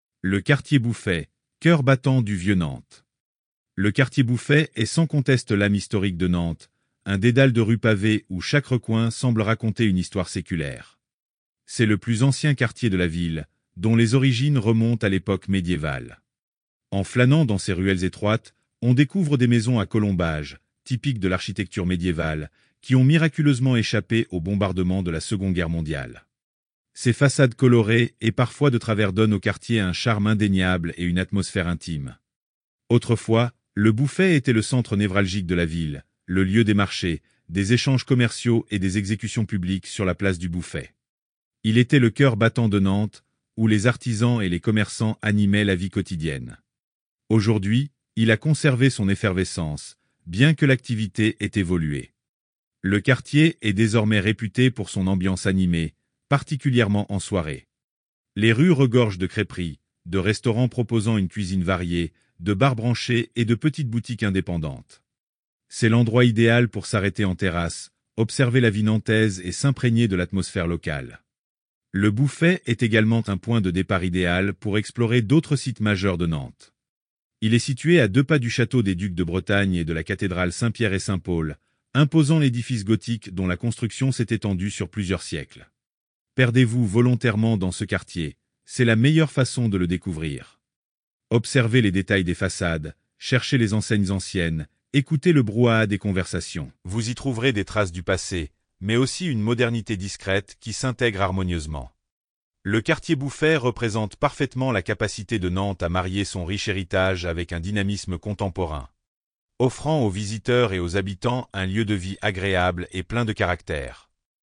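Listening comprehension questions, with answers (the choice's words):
Écoutez l'enregistrement et cochez la bonne réponse.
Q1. Quelle est la principale caractéristique architecturale du Quartier Bouffay ?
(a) Des gratte-ciel modernes.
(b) Des maisons à colombages.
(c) Des villas romaines.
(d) Des immeubles haussmanniens.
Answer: Des maisons à colombages.

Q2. Quand le Quartier Bouffay a-t-il été fondé ?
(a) Au XXe siècle.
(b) Au XIXe siècle.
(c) À l'époque médiévale.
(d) Après la Seconde Guerre Mondiale.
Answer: À l'époque médiévale.

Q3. Quelle était l'activité principale du quartier autrefois ?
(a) La production industrielle lourde.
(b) Les marchés et les échanges commerciaux.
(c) La pêche en haute mer.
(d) La culture de céréales.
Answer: Les marchés et les échanges commerciaux.

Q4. Quelle est l'ambiance du quartier aujourd'hui, surtout en soirée ?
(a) Très calme et résidentielle.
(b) Animée avec de nombreux restaurants et bars.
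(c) Strictement commerciale sans lieux de divertissement.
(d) Fermée aux visiteurs après le coucher du soleil.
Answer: Animée avec de nombreux restaurants et bars.

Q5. Quels monuments historiques sont à proximité du Quartier Bouffay ?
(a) La Tour 50 Otage.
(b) Le Château des Ducs de Bretagne et la Cathédrale.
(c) Le Monastère de Saint-Pierre-et-Saint-Paul.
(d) Les Châteaux de Saint Pierre-et-Saint Paul.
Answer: Le Château des Ducs de Bretagne et la Cathédrale.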